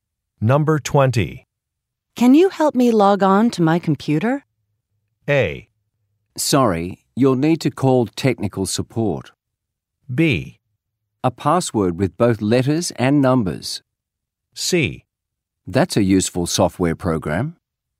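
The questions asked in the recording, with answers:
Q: Can you help me log on to my computer?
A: A: Sorry, you'll need to call technical support.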